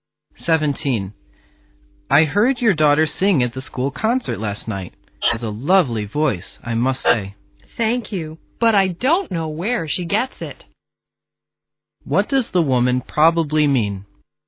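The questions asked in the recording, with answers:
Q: What does the woman probably mean?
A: She doesn't know where her daughter got her singing talent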